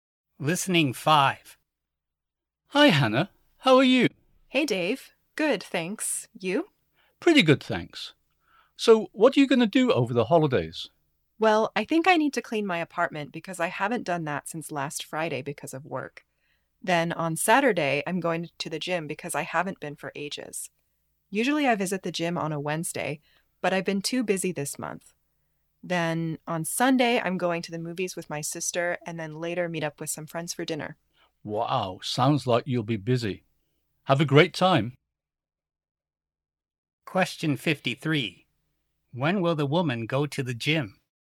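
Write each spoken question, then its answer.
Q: When will the woman go to the gym?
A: On Saturday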